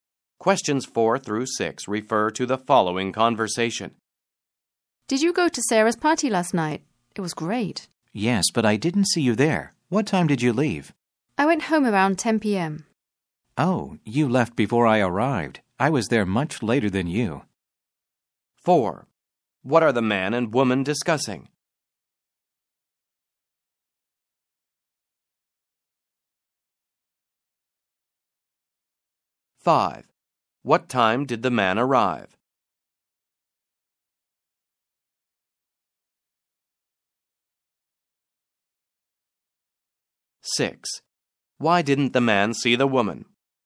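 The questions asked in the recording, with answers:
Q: What are the man and woman discussing?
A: Sarah's party last night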